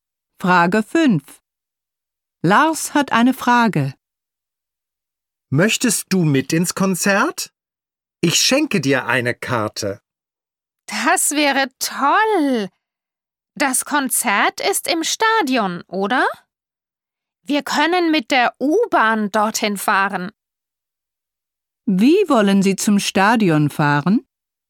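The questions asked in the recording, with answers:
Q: Wie wollen Sie zum Stadion fahren?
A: Mit der U-Bahn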